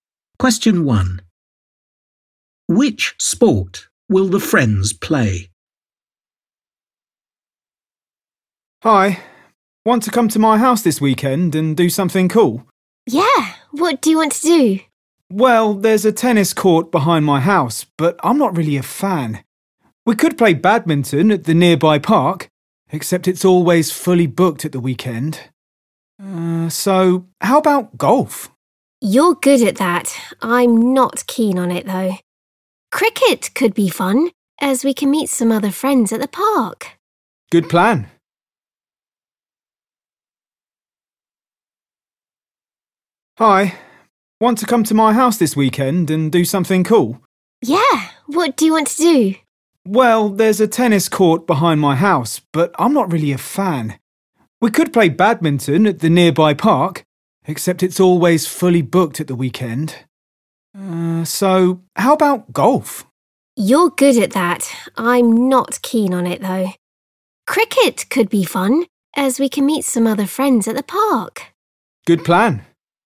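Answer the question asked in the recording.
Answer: cricket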